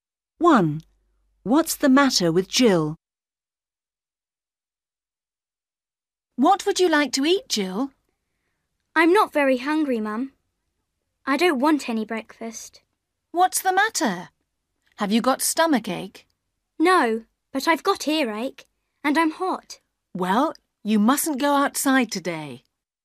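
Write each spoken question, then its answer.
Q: What's the matter with Jill?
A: She has earache and is hot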